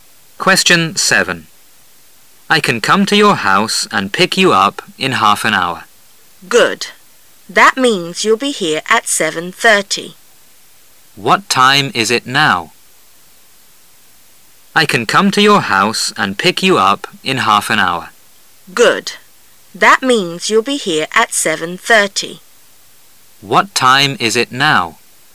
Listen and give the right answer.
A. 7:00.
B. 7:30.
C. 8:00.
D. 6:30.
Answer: A. 7:00.

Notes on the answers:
数字信息题。通过对话中in half an hour和7:30,可知半个小时以后是7:30,那么现在的时间应该是7:00。

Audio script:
[解析] M: I can come to your house and pick you up in half an hour. W: Good. That means you'll be here at 7:30. Q: What time is it now?